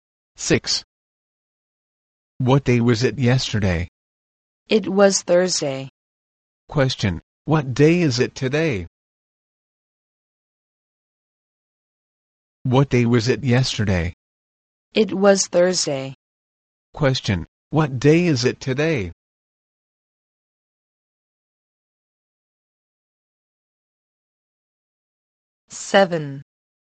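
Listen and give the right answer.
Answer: Friday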